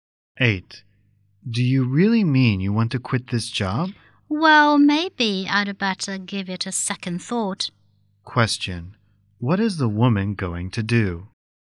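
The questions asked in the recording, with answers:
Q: What is the woman going to do?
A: Reconsider quitting her job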